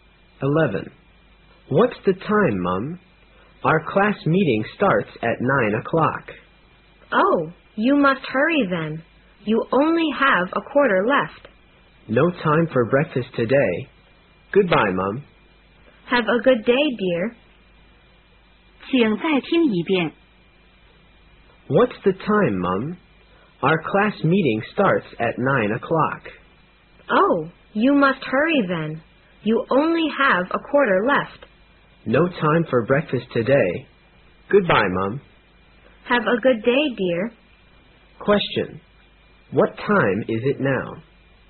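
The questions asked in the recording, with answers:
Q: What time is it now?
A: 8:45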